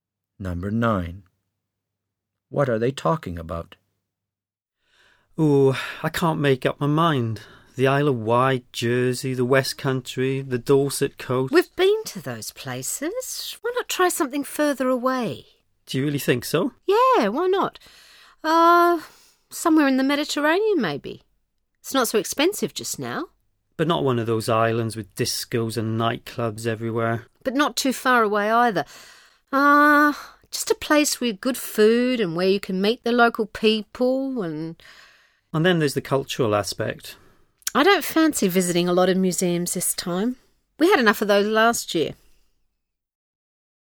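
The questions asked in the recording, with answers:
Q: What are they talking about?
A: Where to go on holiday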